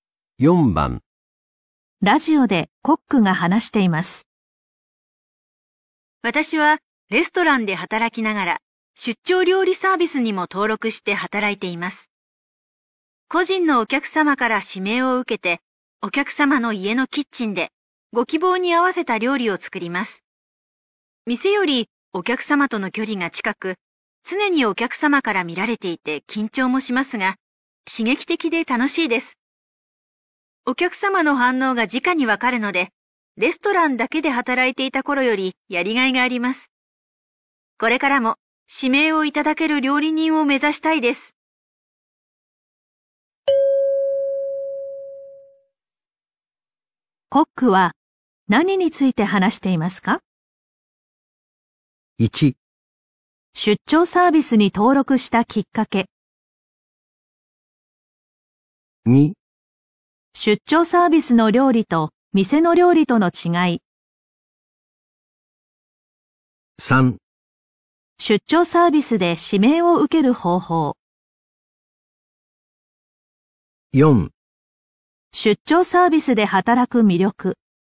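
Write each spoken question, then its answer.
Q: コックは何について話していますか?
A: 4: 出張サービスで働く魅力。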